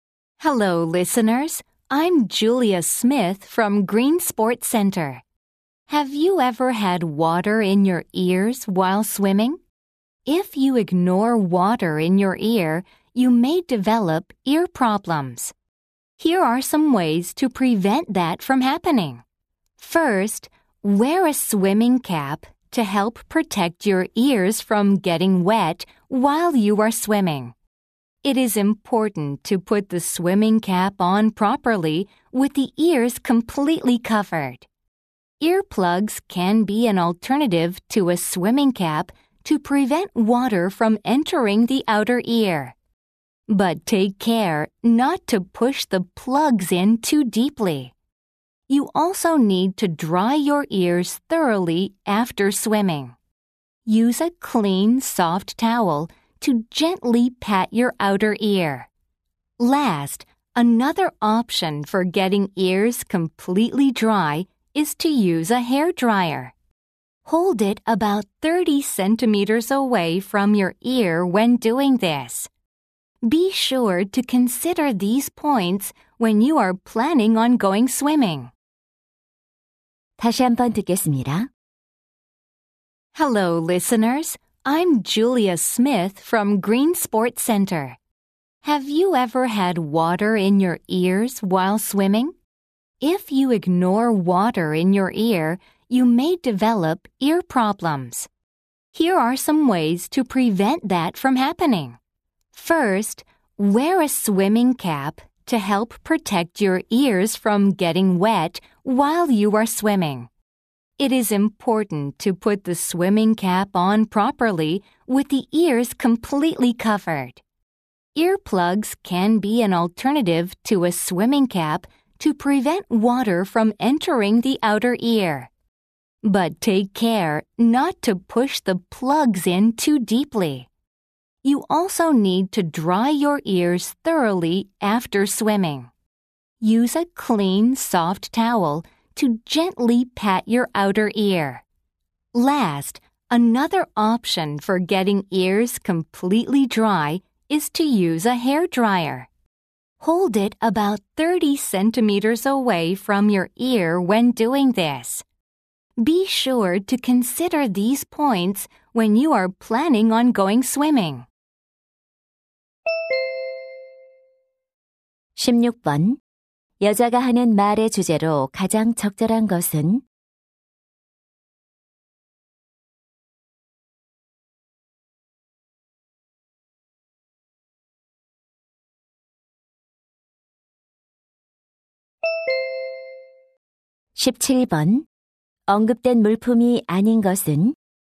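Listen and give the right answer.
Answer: 수영할 때 귀에 물이 들어가는 것을 막는 방법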